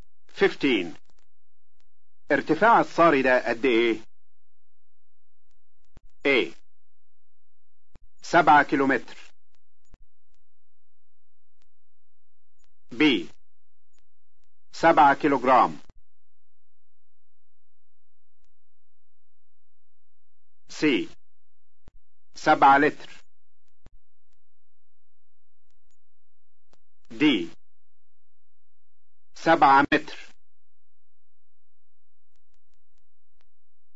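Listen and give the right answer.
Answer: D: 7 متر.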